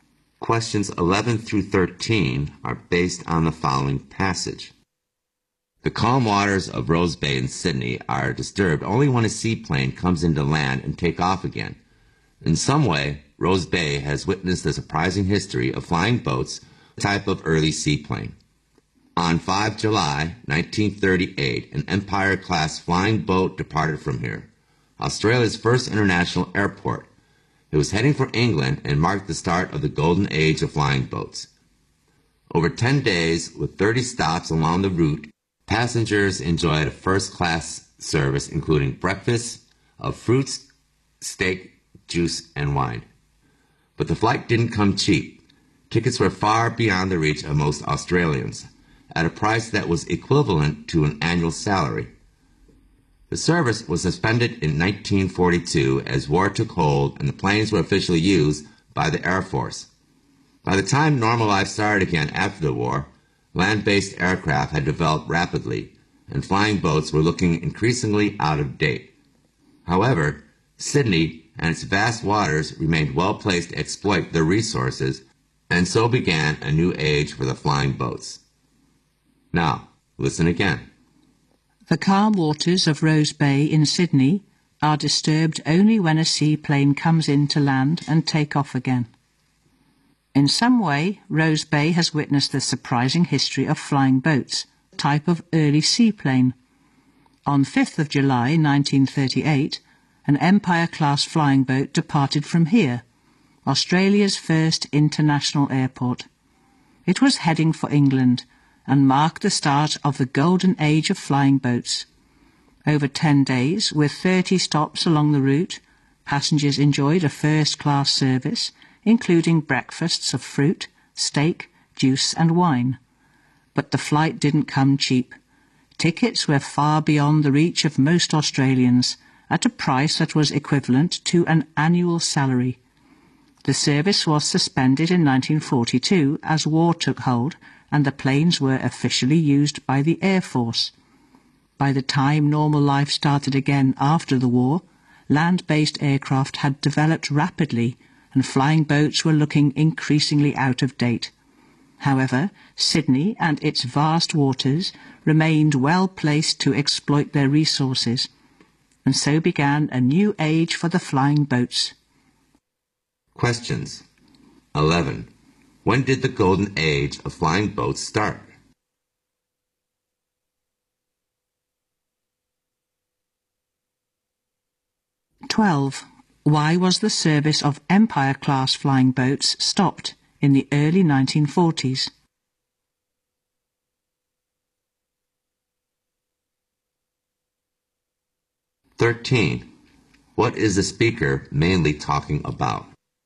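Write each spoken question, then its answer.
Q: When did the golden age of flying boats start?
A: On 5 July 1938

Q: Why was the service of Empire-class flying boats stopped in the early 1940s?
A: Because of the war; the planes were used by the Air Force

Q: What is the speaker mainly talking about?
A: The history of flying boats in Sydney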